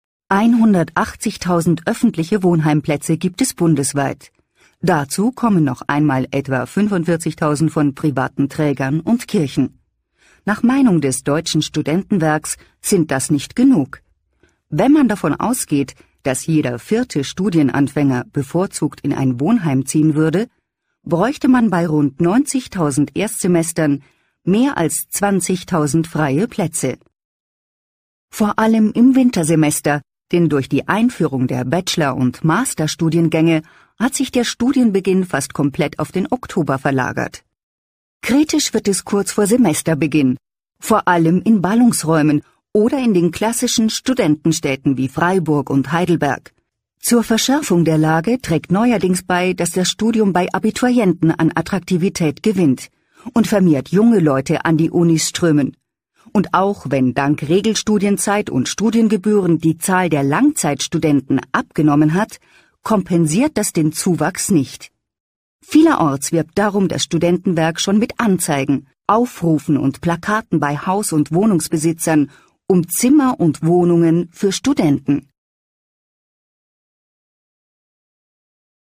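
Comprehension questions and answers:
Klicken Sie auf die Wiedergabetaste, und hören Sie sich einen Ausschnitt aus einem Radiobericht über die Wohnsituation der Schüler an. Entscheiden Sie, ob die Aussagen mit dem Inhalt des Textes übereinstimmen, und beantworten Sie die Fragen 8, 9 und 10.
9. Wohnheimplätze sind besonders bei Erstsemestern begehrt.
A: Ja

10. Die Zahl der Langzeitstudenten verschärft das Wohnproblem.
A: Nein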